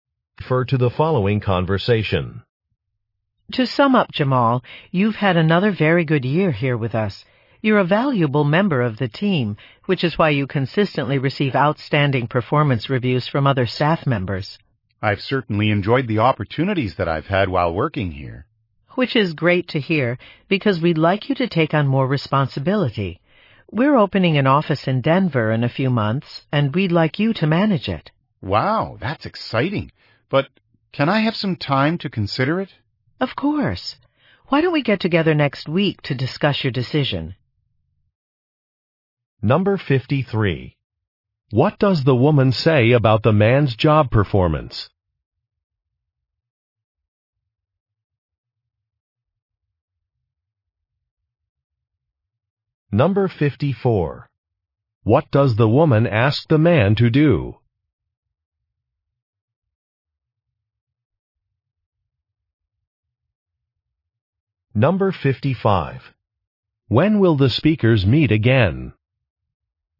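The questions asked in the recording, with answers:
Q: What does the woman say about the man's job performance?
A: He consistently receives outstanding reviews

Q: What does the woman ask the man to do?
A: Manage a new office in Denver

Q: When will the speakers meet again?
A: Next week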